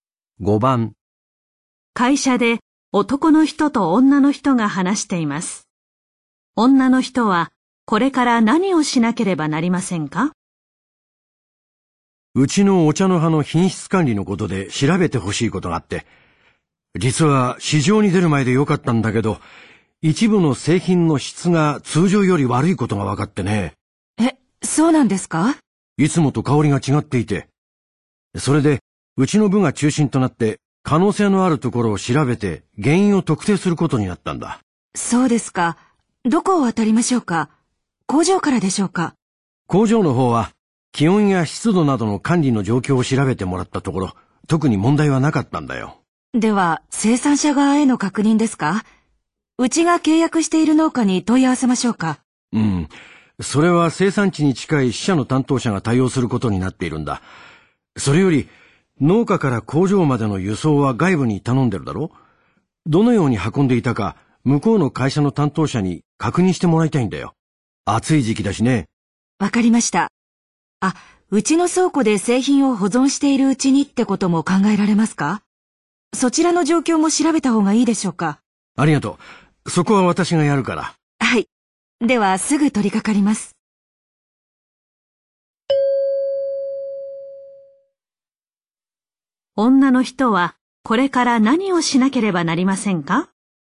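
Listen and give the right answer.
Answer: 輸送会社の担当者に運び方を確認する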